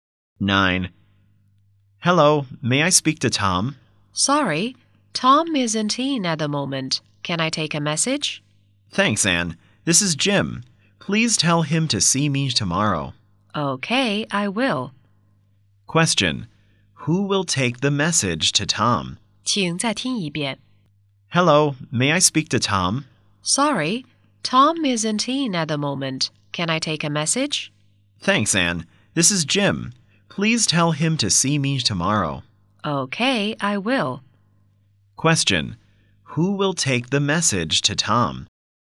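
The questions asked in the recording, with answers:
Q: Who will take the message to Tom?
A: Anne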